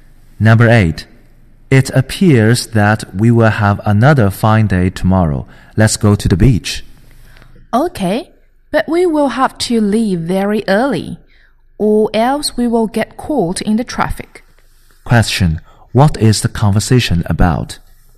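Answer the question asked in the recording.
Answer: Going to the beach tomorrow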